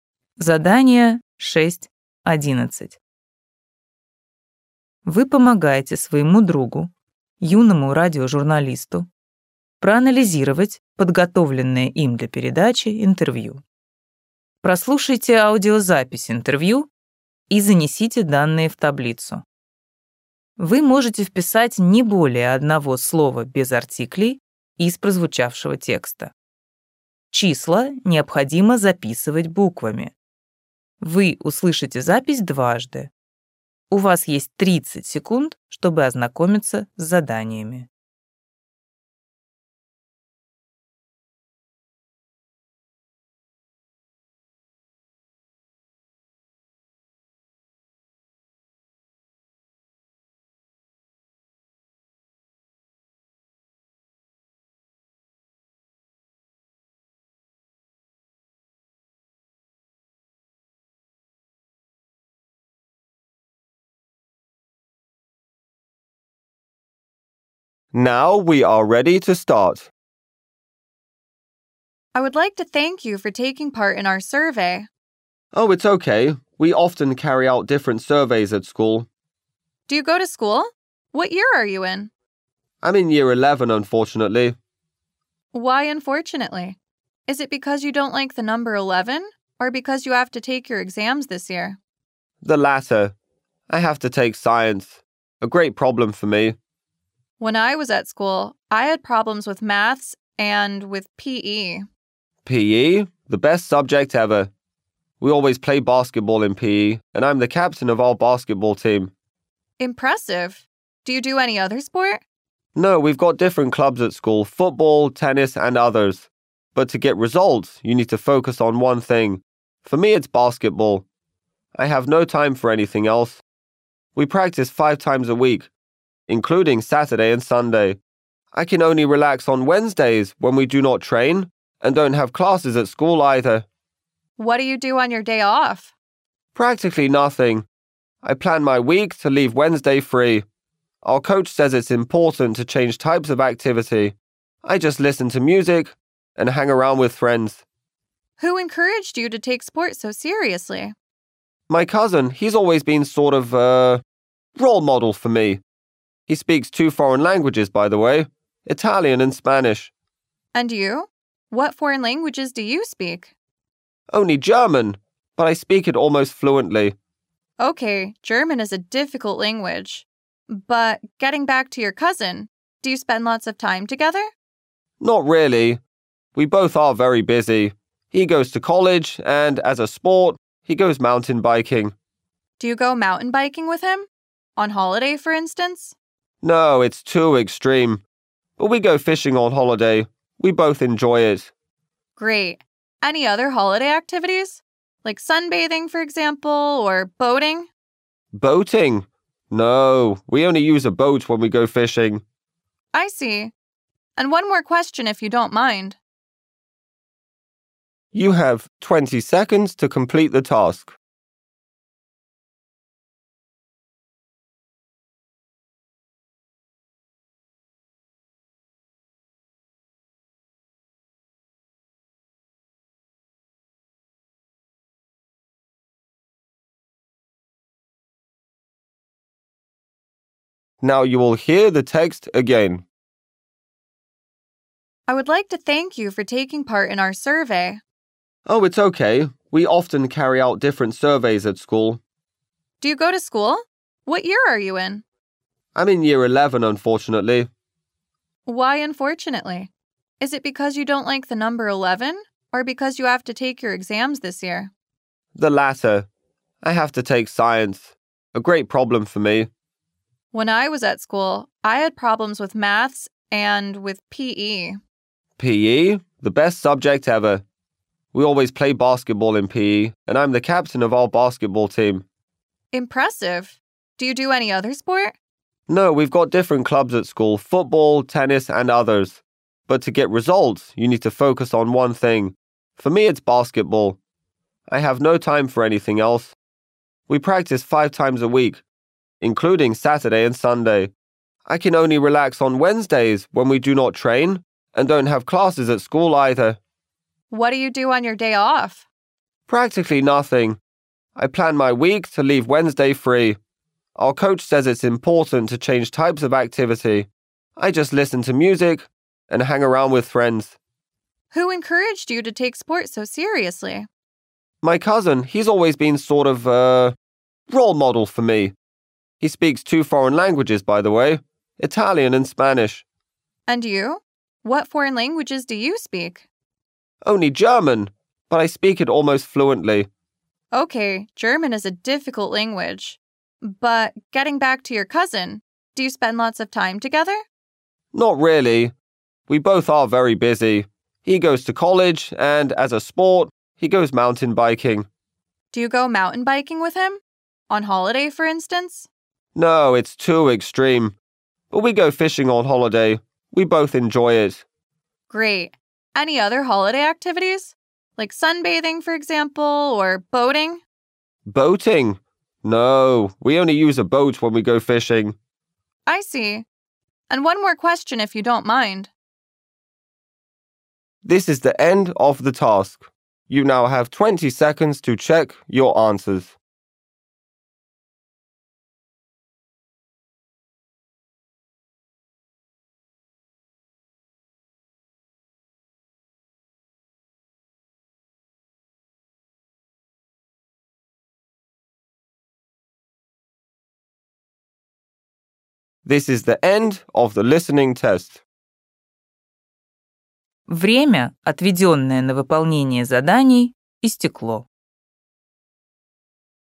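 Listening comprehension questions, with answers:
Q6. The number of the academic year he/she is in ___________________________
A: eleven

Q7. The most difficult school subject ___________________________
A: science

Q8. Regular sports activity ___________________________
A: basketball

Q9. Day off ___________________________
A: Wednesday

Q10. The foreign language he/she speaks ___________________________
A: German

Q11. Favourite holiday activity ___________________________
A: fishing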